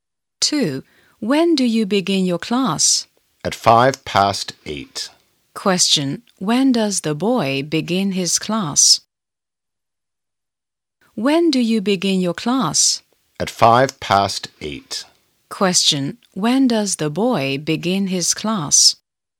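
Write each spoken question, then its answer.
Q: Question. When does the boy begin his class?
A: At 8:05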